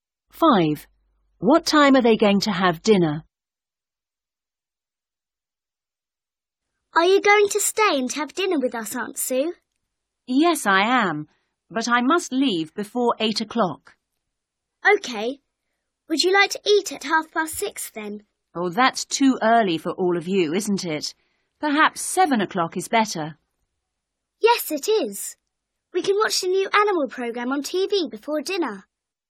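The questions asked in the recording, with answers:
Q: What time are they going to have dinner?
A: 7 o'clock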